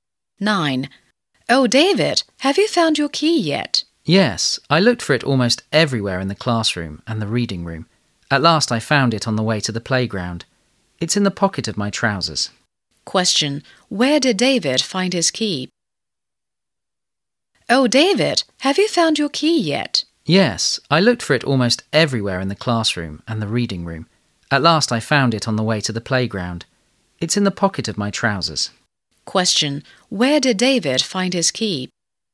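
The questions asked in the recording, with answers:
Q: Question. Where did David find his key?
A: On the way to the playground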